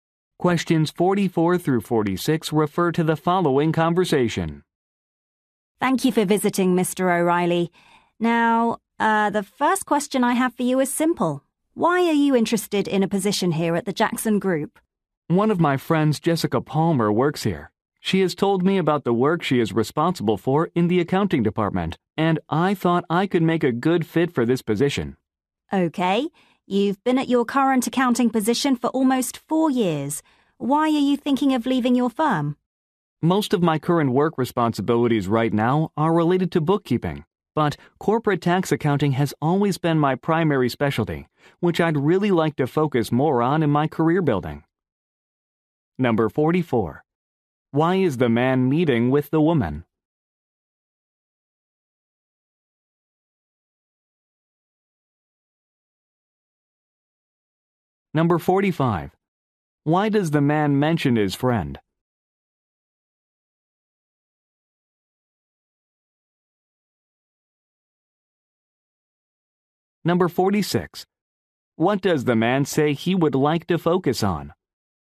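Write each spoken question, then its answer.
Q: Why is the man meeting with the woman?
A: For a job interview

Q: What does the man say he would like to focus on?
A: Corporate tax accounting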